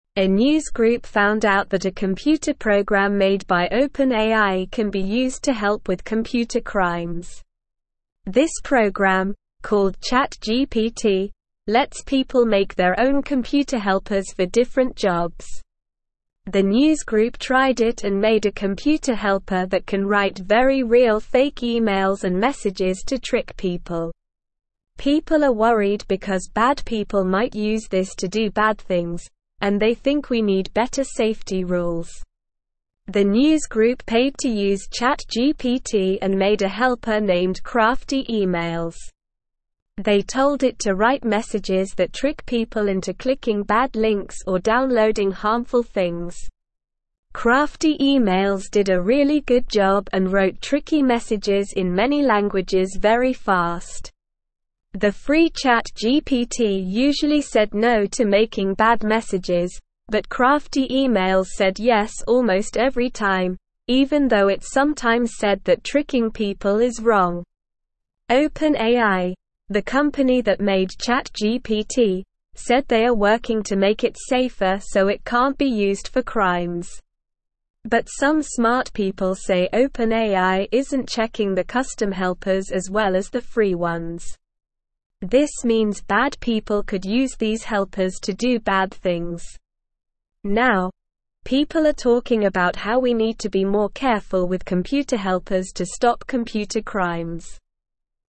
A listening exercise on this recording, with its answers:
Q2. A news group found out that a (1)______ program made by OpenAI can be used to (2)______ with computer crimes.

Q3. The news group tried it and made a computer helper that can write very real fake (3)______ and messages to trick people.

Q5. They told it to write messages that (5)______ people into clicking bad links or downloading (6)______ things.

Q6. They told it to write messages that (5)______ people into clicking bad links or downloading (6)______ things.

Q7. Crafty Emails did a really (7)______ job and wrote tricky messages in many languages very fast.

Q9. The free ChatGPT usually said no to making bad messages, but Crafty Emails said yes almost every (8)______, even though it sometimes said that (9)______ people is wrong.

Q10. OpenAI, the company that made ChatGPT, said they are working to make it safer so it can't be used for (10)______.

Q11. But some smart (11)______ say OpenAI isn't checking the custom helpers as well as the free ones.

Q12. This means bad people could use these helpers to do bad (12)______.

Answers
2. help
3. emails
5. trick
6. harmful
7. good
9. tricking
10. crimes
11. people
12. things

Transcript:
A news group found out that a computer program made by OpenAI can be used to help with computer crimes. This program, called ChatGPT, lets people make their own computer helpers for different jobs. The news group tried it and made a computer helper that can write very real fake emails and messages to trick people. People are worried because bad people might use this to do bad things, and they think we need better safety rules.
The news group paid to use ChatGPT and made a helper named Crafty Emails. They told it to write messages that trick people into clicking bad links or downloading harmful things. Crafty Emails did a really good job and wrote tricky messages in many languages very fast. The free ChatGPT usually said no to making bad messages, but Crafty Emails said yes almost every time, even though it sometimes said that tricking people is wrong.
OpenAI, the company that made ChatGPT, said they are working to make it safer so it can't be used for crimes. But some smart people say OpenAI isn't checking the custom helpers as well as the free ones. This means bad people could use these helpers to do bad things. Now, people are talking about how we need to be more careful with computer helpers to stop computer crimes.

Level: Level 2